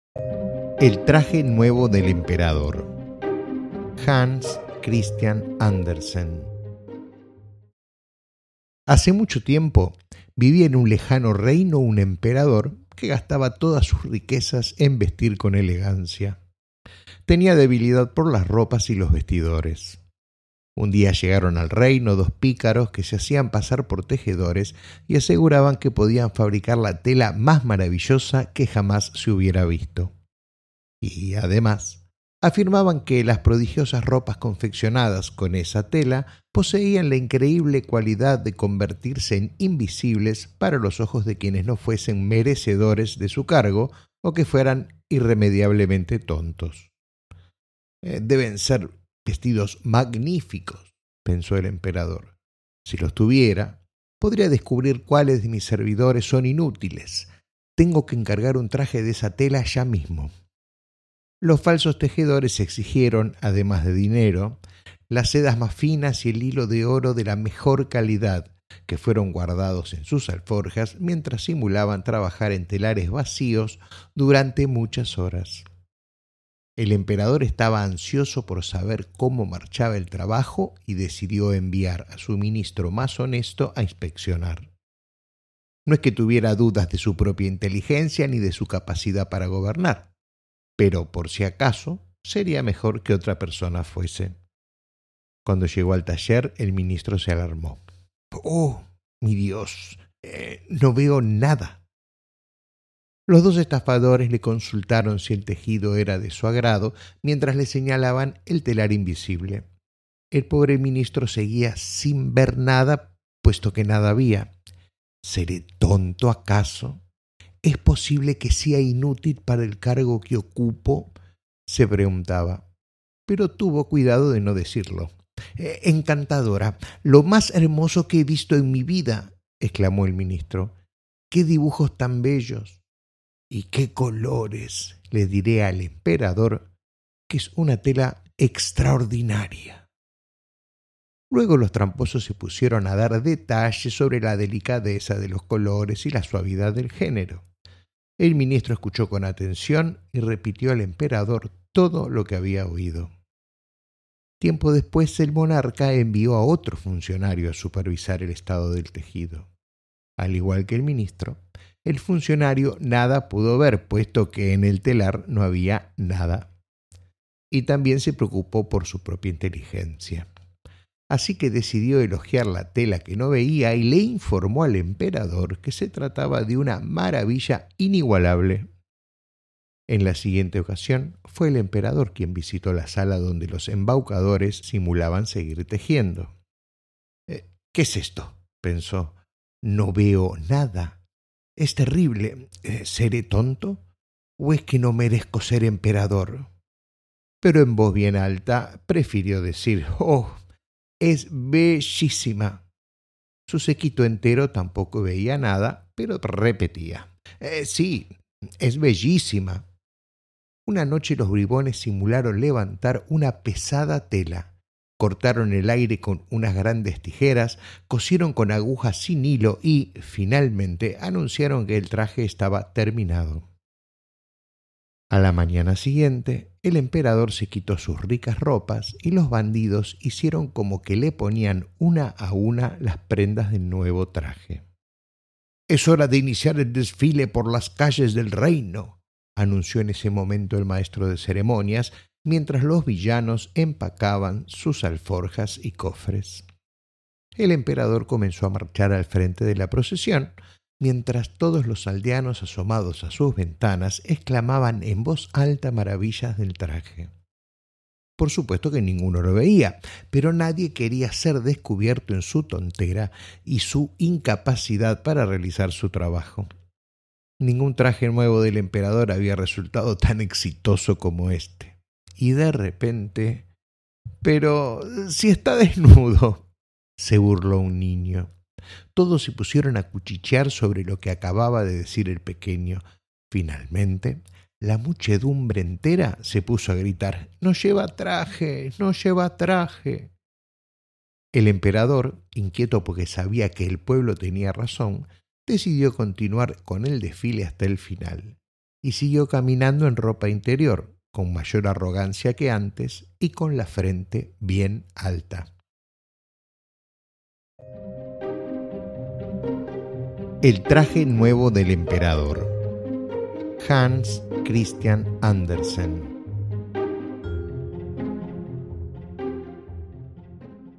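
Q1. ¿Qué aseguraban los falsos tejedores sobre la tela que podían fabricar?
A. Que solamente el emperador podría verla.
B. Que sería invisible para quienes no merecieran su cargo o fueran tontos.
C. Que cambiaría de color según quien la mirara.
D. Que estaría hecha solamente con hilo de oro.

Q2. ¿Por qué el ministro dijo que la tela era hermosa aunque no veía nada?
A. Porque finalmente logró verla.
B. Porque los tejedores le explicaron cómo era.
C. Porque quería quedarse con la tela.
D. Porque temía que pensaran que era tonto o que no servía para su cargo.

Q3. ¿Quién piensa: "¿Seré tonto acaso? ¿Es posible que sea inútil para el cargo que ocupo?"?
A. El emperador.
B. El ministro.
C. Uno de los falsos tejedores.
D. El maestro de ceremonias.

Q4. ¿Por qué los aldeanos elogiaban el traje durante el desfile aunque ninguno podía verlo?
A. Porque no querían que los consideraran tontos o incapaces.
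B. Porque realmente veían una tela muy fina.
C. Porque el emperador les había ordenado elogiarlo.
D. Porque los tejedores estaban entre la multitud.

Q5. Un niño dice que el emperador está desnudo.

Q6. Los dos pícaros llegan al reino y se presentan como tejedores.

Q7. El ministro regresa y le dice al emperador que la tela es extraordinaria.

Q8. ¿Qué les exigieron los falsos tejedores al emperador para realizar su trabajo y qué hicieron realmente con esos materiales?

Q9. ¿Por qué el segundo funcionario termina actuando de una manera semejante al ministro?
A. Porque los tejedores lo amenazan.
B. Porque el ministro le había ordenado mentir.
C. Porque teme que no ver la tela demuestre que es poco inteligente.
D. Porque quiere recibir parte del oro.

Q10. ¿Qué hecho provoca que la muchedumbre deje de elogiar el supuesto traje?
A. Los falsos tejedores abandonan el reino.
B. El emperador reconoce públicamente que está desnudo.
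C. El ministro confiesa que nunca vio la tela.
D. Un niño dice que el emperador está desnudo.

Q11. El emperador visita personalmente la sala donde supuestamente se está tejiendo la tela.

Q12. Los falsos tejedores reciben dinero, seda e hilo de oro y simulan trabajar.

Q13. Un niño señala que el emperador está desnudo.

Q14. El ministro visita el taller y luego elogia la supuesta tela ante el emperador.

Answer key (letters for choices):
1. B
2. D
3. B
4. A
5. 3
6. 1
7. 2
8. Dinero, las sedas más finas e hilo de oro; los guardaron en sus alforjas y simularon trabajar en telares vacíos.
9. C
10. D
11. 3
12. 1
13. 4
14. 2

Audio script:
El traje nuevo del emperador
Hans Christian Andersen
Hace mucho tiempo, vivía en un lejano reino un emperador que gastaba todas sus riquezas en vestir con elegancia.
Tenía debilidad por las ropas y los vestidores.
Un día llegaron al reino dos pícaros que se hacían pasar por tejedores y aseguraban que podían fabricar la tela más maravillosa que jamás se hubiera visto. 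Y, además, afirmaban que las prodigiosas ropas confeccionadas con esa tela poseían la increíble cualidad de convertirse en invisibles para los ojos de quienes no fuesen merecedores de su cargo o que fueran irremediablemente tontos.
-iDeben ser vestidos magníficos! -pensó el emperador-. Si los tuviera, podría descubrir cuáles de mis servidores son inútiles.. iTengo que encargar un traje de esa tela ya mismo!
Los falsos tejedores exigieron, además de dinero, las sedas más finas y el hilo de oro de la mejor calidad, que fueron guardando en sus alforjas mientras simulaban trabajar en telares vacíos durante muchas horas.
El emperador estaba ansioso por saber cómo marchaba el trabajo y decidió enviar a su ministro más honesto a inspeccionar. No es que tuviera dudas de su propia inteligencia ni de su capacidad para gobernar, pero, por si acaso, sería mejor que otra persona fuese.
Cuando llegó al taller el ministro se alarmó.
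-iOh, mi dios! iNo veo nada!
Los dos estafadores le consultaron si el tejido era de su agrado mientras le señalaban el telar invisible. El pobre ministro seguía sin ver nada, puesto que nada había.
-¿Seré tonto acaso? ¿Es posible que sea inútil para el cargo que ocupo?-se preguntaba. Pero tuvo cuidado de no decirlo.
iLo más hermoso que he visto en mi vida!-exclamó el ministro-. iQué dibujos tan bellos! iY qué colores! Le diré al emperador que es una tela extraordinaria.
Luego los tramposos se pusieron a dar detalles sobre la delicadeza de los colores y la suavidad del género. El ministro escuchó con atención y repitió al emperador todo lo que había oído.
Tiempo después el monarca envió a otro funcionario a supervisar el estado del tejido. Al igual que el ministro, el funcionario nada pudo ver, puesto que en el telar no había nada. Y también se preocupó por su propia inteligencia.
Así que decidió elogiar la tela que no veía y le informó al emperador que se trataba de una maravilla inigualable.
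En la siguiente ocasión, fue el emperador quien visitó la sala donde los embaucadores simulaban seguir tejiendo.
-¿Qué es esto?-pensó–. iNo veo nada! ¿O es que no merezco ser emperador?
Pero en voz bien alta prefirió decir:
Su séquito entero tampoco veía nada, pero repetía:
Una noche los bribones simularon levantar una pesada tela, cortaron el aire con unas grandes tijeras, cosieron con agujas sin hilo y, finalmente, anunciaron que el traje estaba terminado.
A la mañana siguiente, el emperador se quitó sus ricas ropas y los bandidos hicieron como que le ponían una a una las prendas del nuevo traje
-Es hora de iniciar el desfile por las calles del reino!-anunció en ese momento el maestro de ceremonias, mientras los villanos empacaban sus alforjas y cofres.
El Emperador comenzó a marchar al frente de la procesión, mientras todos los aldeanos asomados a sus ventanas exclamaban en voz alta maravillas del traje.
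Por supuesto que ninguno lo veía, pero nadie quería ser descubierto en su tontera o en su incapacidad para realizar su trabajo. Ningún traje nuevo del emperador había resultado tan exitoso como este. Y de repente:
-Pero...isi está desnudo! -se burló un niño.
Todos se pusieron a cuchichear sobre lo que acababa de decir el pequeño. Finalmente, la muchedumbre entera se puso a gritar:
-iNo lleva traje!
El emperador, inquieto porque sabía que el pueblo tenía razón, decidió continuar con el desfile hasta el final. Y siguió caminando en ropa interior, con mayor arrogancia que antes y con la frente bien alta.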